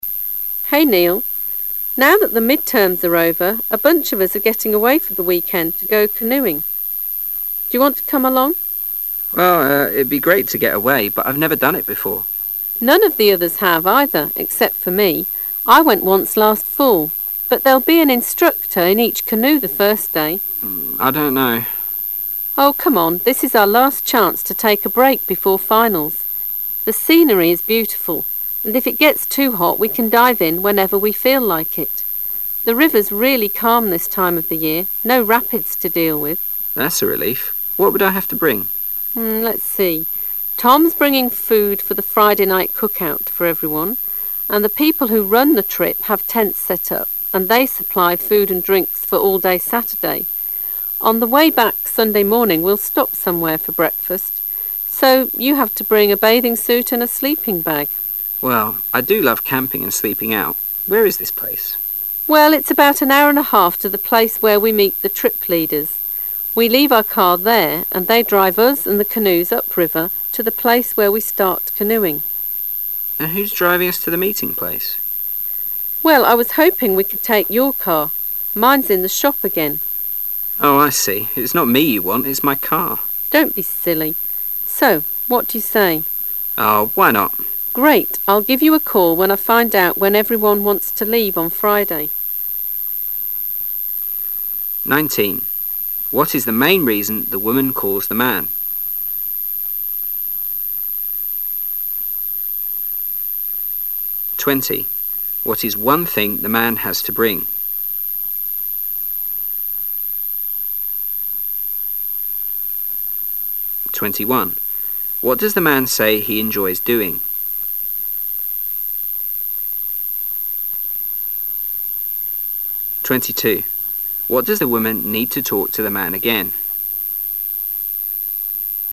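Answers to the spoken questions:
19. To invite him on a canoeing weekend trip
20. A sleeping bag (or a bathing suit)
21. Camping and sleeping out
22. To tell him what time everyone wants to leave on Friday

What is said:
[解析] 19-22 W: [19] Hey Neal, now that the midterms are over, a bunch of us are getting away for the weekend to go canoeing. Do you want to come along? M: Well, urn, it'd be great to get away, but I've never done it before. W: None of the others have either except for me. I went once last fall. But there'll be an instructor in each canoe the first day. M: I don't know. W: Oh, come on. This is our last chance to take a break before finals. The scenery is beautiful, and if it gets too hot we can dive in whenever we feel like it. The river's really calm this time of the year, no rapids to deal with. M: That's a relief. What would I have to bring? W: Let's see. Tom's bringing food for the Friday night cookout for everyone. 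And the people who run the trip have tents set up and they supply food and drinks for all day Saturday. On the way back Sunday morning we'll stop somewhere for breakfast. So, [20] you have to bring a bathing suit and a sleeping bag. M: [21] Well, I do love camping and sleeping out. Where is this place? W: Well, it's about an hour and a half to the place where we meet the trip leaders. We leave our car there and they drive us and the canoes upriver to the place where we start canoeing. M: And who's driving us to the meeting place? W: Well, I was hoping we could take your car. Mine's in the shop again. M: Oh, I see. It's not me you want; it's my car. W: Don't be silly. So what would you say? M: Oh, why not! W: [22] Great! I'll give you a call when I find out when everyone wants to leave on Friday. 19.What is the main reason the womail calls the man?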